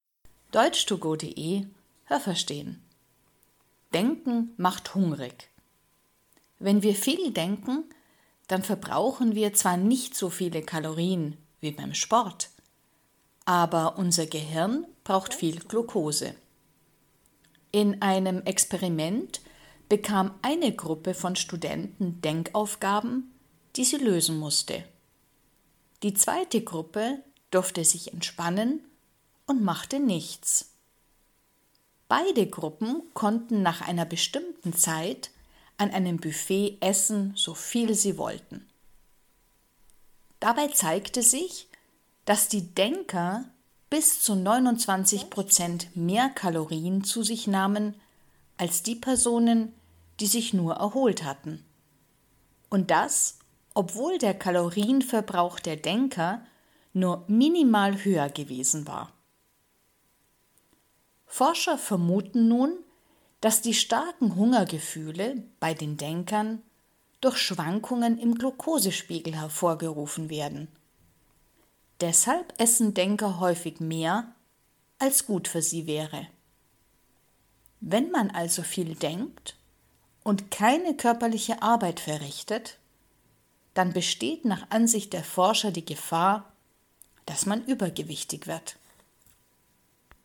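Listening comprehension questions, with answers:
Was haben Sie gehört? Es gibt nur eine korrekte Antwort.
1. Beim Sport verbrauchen wir _____ Kalorien als beim Denken.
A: mehr

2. Das Experiment: Eine Gruppe musste Denkaufgaben lösen, die andere Gruppe ...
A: durfte sich entspannen und machte nichts

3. Nach dem Experiment: Beide Gruppen ...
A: konnten an einem Buffet essen, so viel sie wollten

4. Wer hat bis zu 29 Prozent mehr gegessen?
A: Die Denker

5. Die Denker haben bei dem Experiment _____ Kalorien verbraucht als die andere Gruppe.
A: nur minimal mehr

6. Warum haben Denker starke Hungergefühle?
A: Wegen Schwankungen im Glukosespiegel

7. Wenn man viel denkt und nicht körperlich arbeitet, dann besteht die Gefahr, dass man ...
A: übergewichtig wird

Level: Hörtexte B (mittel)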